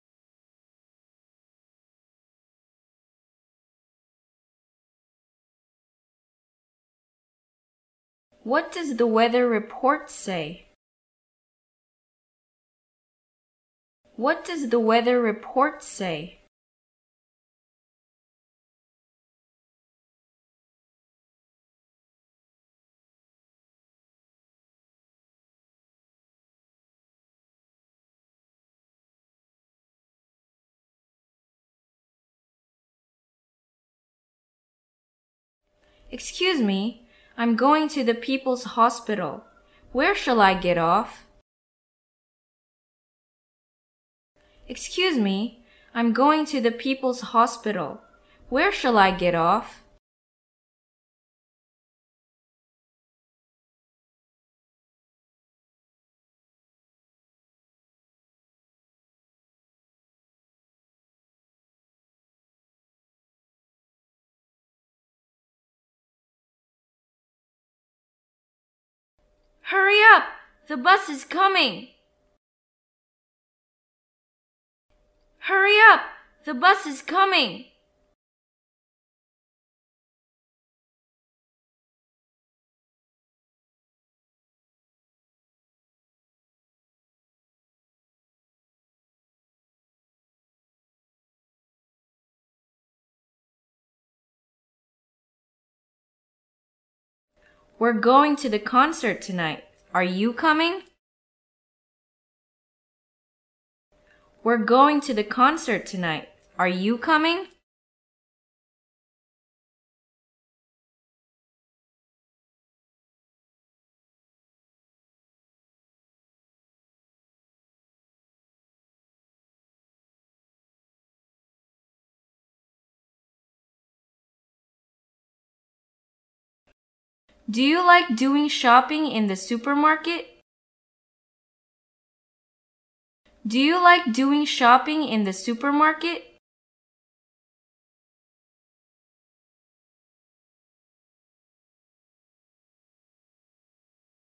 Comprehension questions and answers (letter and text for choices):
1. What does the weather report say?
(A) It's going to rain,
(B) It says nothing.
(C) It's nothing.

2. Excuse me. I'm going to the People's Hospital, where shall I get off?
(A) Sorry, you're going in the wrong way.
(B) The People's Hospital is not far from here.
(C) You'd better go by taxi.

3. Hurry up! The bus is coming!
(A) Is the bus coming?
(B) Buses are cheaper than taxis.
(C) Oh, I'm afraid I'll miss it.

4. We're going to the concert tonight, are you coming?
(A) Sure, why not?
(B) Sorry, I don't know.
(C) Thank you.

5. Do you like doing shopping in the supermarket?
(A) I'd like to have a look at the coat.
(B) There's a department store over there.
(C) Yes, of course. What about you?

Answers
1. (A) It's going to rain,
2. (A) Sorry, you're going in the wrong way.
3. (C) Oh, I'm afraid I'll miss it.
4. (A) Sure, why not?
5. (C) Yes, of course. What about you?

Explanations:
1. 听力原文:What does the weather report say? 天气预报说的什么?这里实际上问的是天气情况,回答应与天气有关。选项[A]It's going to rain. (天将下雨。)符合题意。
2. 听力原文:Excuse me. I'm going to the People's Hospital, where shall I get off? 我想去人民医院,我该在哪里下车呢? 选项[A]Sorry, you're going in the wrong way. 符合语境。
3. 听力原文:Hurry up! The bus is coming! 赶快! 汽车来了。选项[C]Oh, I'm afraid I'll miss it. (我恐怕将错过它。)符合语境。
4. 听力原文:We're going to the concert tonight, are you coming? 这是个一般疑问句,可以用Yes或No来回答。选项中只有[A]sure, why not? 符合题意,这里Sure表示肯定回答,代替Yes。
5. 听力原文:Do you like doing shopping in the supermarket? 你喜欢在超市购物吗? 这是个一般疑问句,肯定时用Yes来回答,否定时用No来回答。选项[C]Yes, of course. What about you? 符合题意。

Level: 公共英语一级(B)